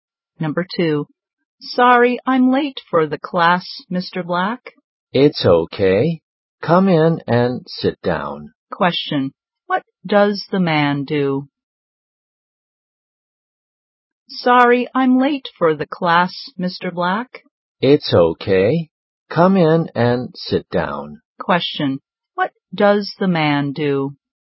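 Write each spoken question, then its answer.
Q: What does the man do?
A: He is a teacher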